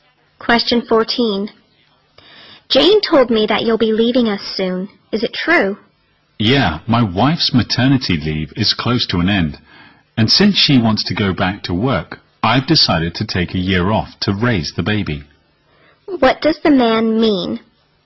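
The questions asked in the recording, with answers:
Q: What does the man mean?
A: He will take a year off to look after the baby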